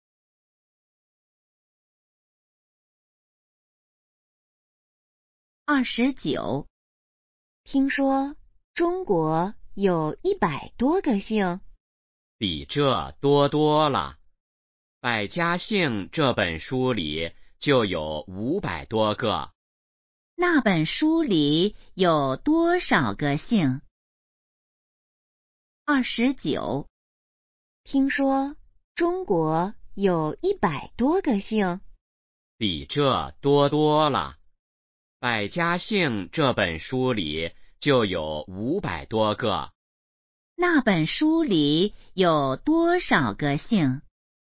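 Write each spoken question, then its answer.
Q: 那本书里有多少个姓?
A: 500多个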